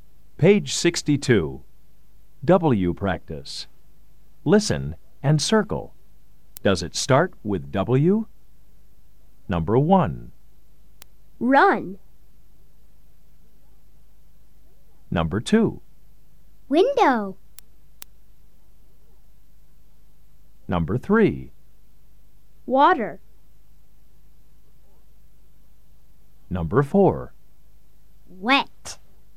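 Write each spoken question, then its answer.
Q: Window.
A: Yes

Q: Water.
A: Yes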